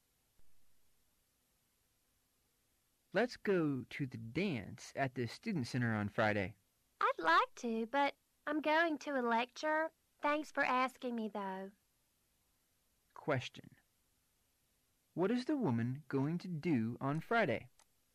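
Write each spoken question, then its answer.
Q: What is the woman going to do on Friday?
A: Go to a lecture

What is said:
[听力原文] M: Let's go to the dance at the Student Center on Friday. W: I'd like to. but I'm going to a lecture. Thanks for asking me though. Q: What is the woman going to do on Friday?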